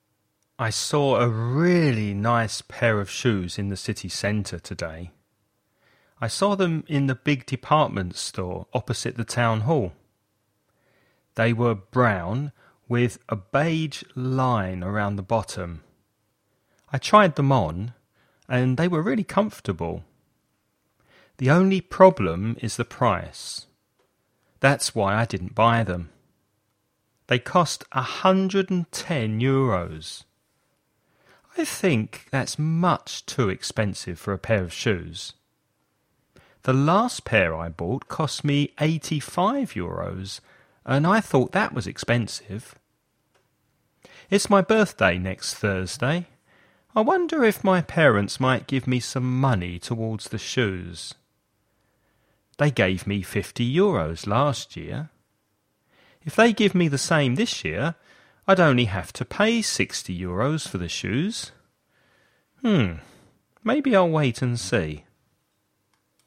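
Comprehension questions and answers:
Escucha el audio y completa el ejercicio.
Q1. Where did the man see the shoes?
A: In the big department store opposite the town hall

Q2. What colour were the shoes?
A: Brown with a beige line around the bottom

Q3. How much do the shoes cost?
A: 110 euros

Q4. When's the man's birthday?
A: Next Thursday

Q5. How much money did the man's parents give him last year for a birthday present?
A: 50 euros

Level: nivel básico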